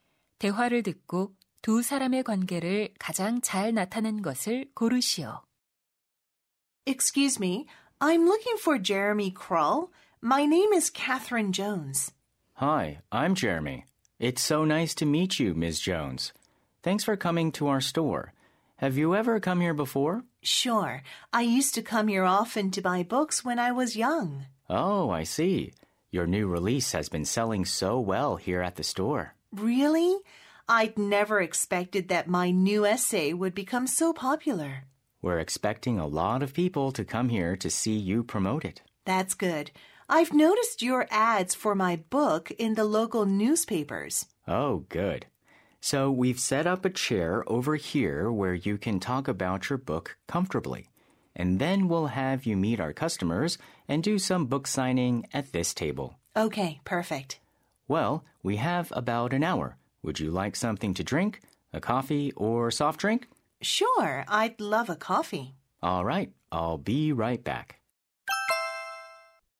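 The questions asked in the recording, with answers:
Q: 대화를 듣고 두 사람의 관계를 가장 잘 나타낸 것을 고르시오.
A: 작가 - 서점 직원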